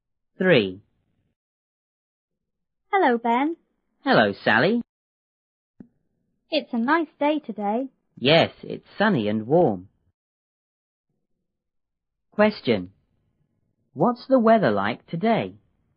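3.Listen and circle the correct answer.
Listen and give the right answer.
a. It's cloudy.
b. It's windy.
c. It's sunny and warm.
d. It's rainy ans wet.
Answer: c. It's sunny and warm.

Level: 六年级下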